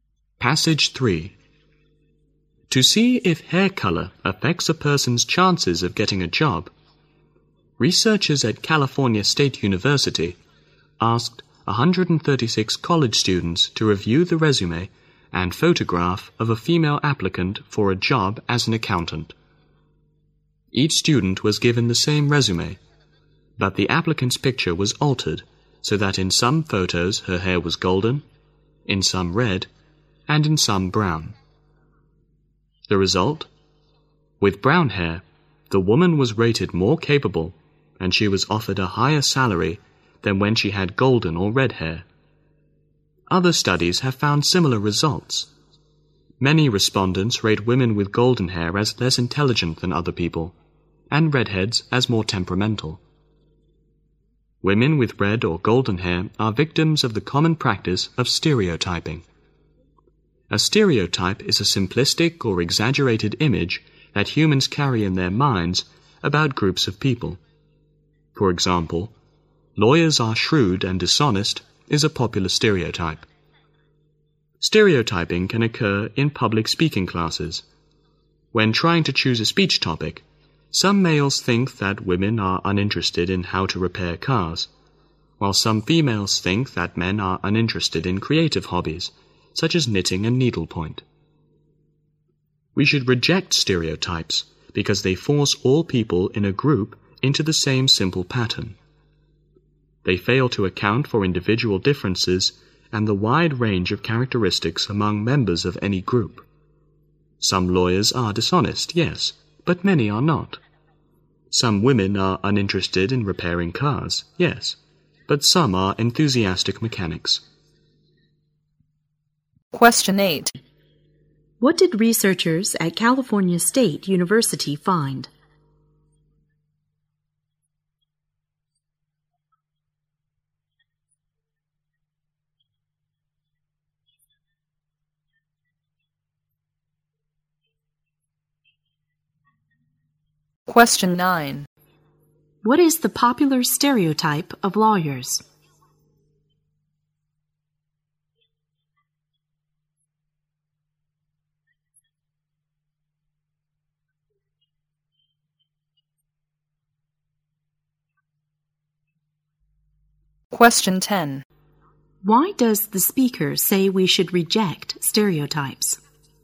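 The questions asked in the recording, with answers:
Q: What did researchers at California State University find?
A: With brown hair, the woman was rated more capable and offered a higher salary.

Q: What is the popular stereotype of lawyers?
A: Lawyers are shrewd and dishonest.

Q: Why does the speaker say we should reject stereotypes?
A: They force everyone in a group into the same simple pattern and ignore individual differences.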